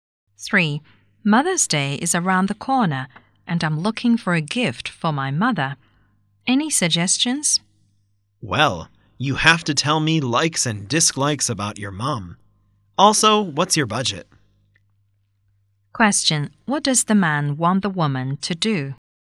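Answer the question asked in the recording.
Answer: Tell him about her mother's likes and dislikes and her budget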